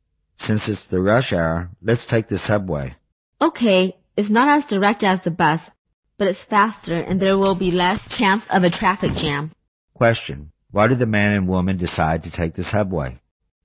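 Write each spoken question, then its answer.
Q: Why did the man and woman decide to take the subway?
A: It's faster, with less chance of a traffic jam in rush hour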